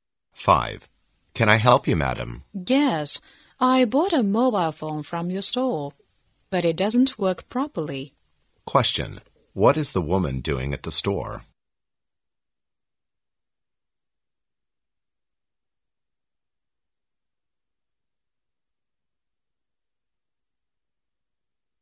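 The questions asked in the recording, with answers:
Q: Question. What is the woman doing at the store?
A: Complaining about a mobile phone that doesn't work properly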